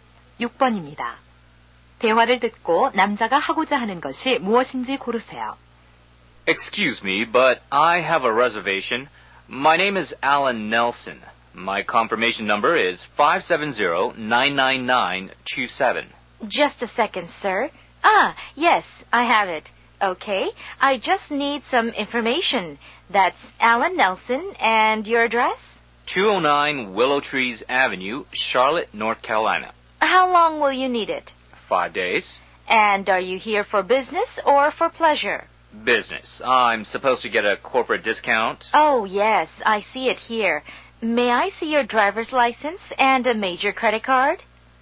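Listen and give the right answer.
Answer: 차 렌트하기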